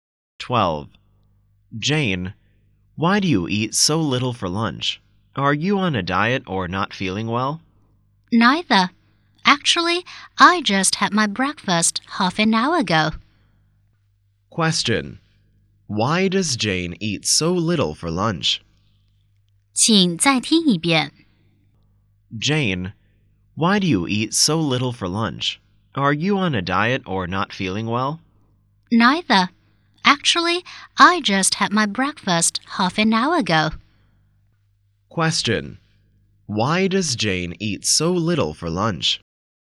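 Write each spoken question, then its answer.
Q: Why does Jane eat so little for lunch?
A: She had breakfast half an hour ago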